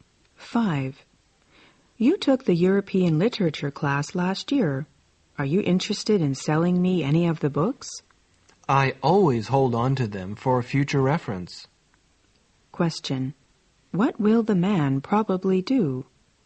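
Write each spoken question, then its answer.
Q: What will the man probably do?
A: Keep his books rather than sell them.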